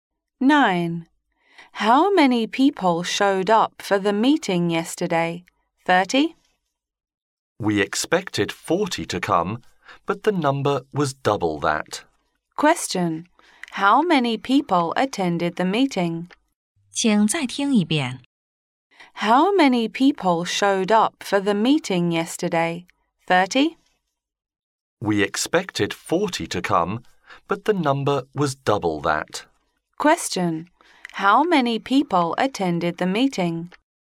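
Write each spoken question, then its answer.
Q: Question, how many people attended the meeting?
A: 80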